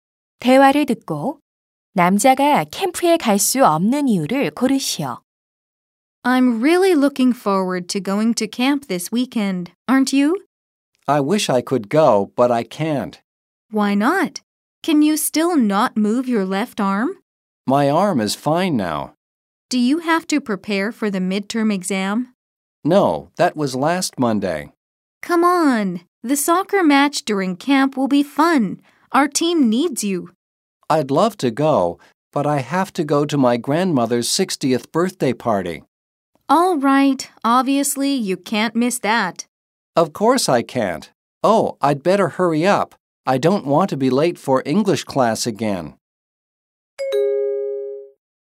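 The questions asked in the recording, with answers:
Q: 대화를 듣고 남자가 캠프에 갈 수 없는 이유를 고르시오.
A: 할머니의 60번째 생신 파티에 가야 해서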